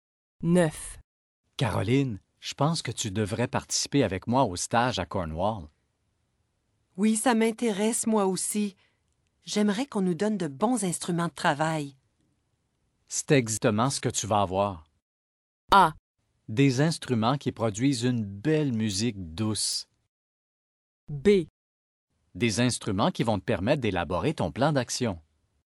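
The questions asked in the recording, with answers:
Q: C'est exactement ce que tu vas avoir.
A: B: Des instruments qui vont te permettre d'élaborer ton plan d'action.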